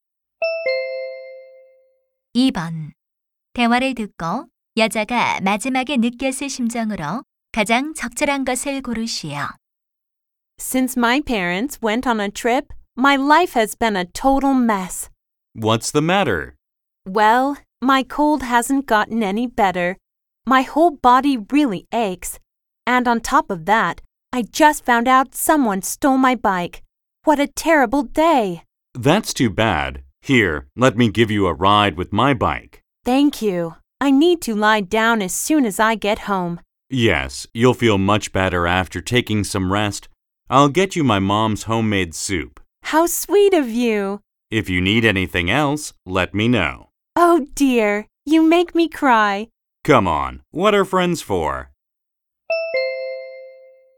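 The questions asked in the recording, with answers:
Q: 대화를 듣고 여자가 마지막에 느꼈을 심정으로 가장 적절한 것을 고르시오.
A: 감동함, 고마움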